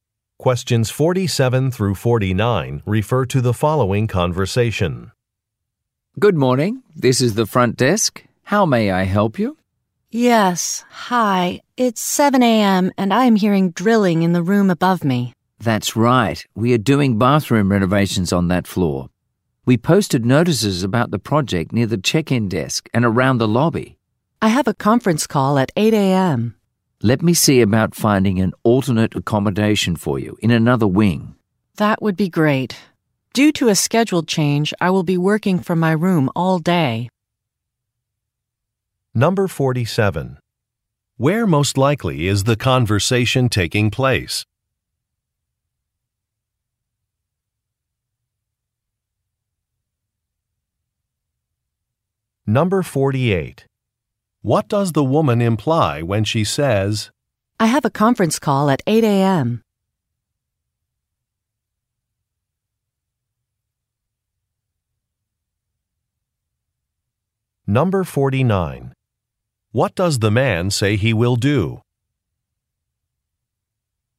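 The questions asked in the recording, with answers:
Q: Where most likely is the conversation taking place?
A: At a hotel

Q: What does the woman imply when she says,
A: The noise will disturb her call

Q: What does the man say he will do?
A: Find her a room in another wing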